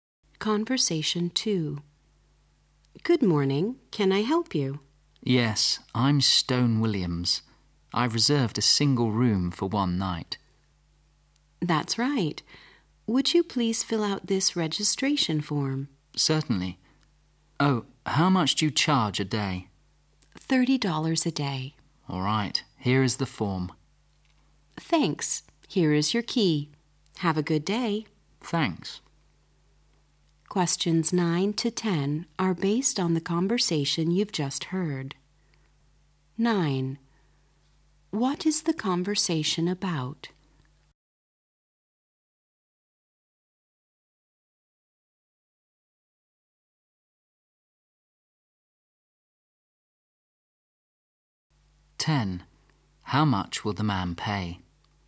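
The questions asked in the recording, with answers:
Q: What is the conversation about?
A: Checking in at a hotel.

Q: How much will the man pay?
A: $30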